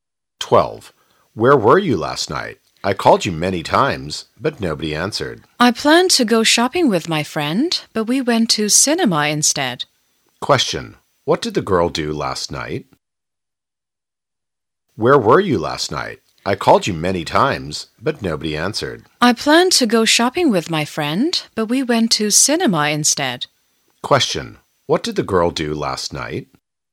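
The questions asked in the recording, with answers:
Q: What did the girl do last night?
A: She went to the cinema.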